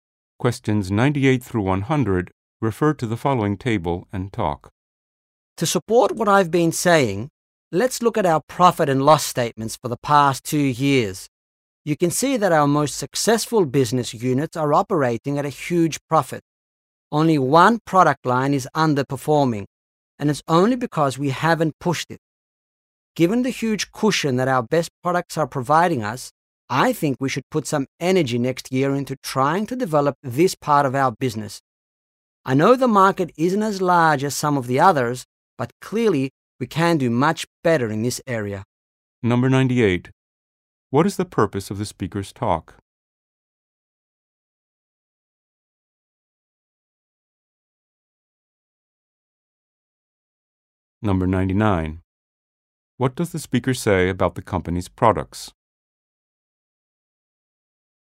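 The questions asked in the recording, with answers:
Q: What is the purpose of the speaker's talk?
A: To propose developing an underperforming product line

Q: What does the speaker say about the company's products?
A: The most successful units are very profitable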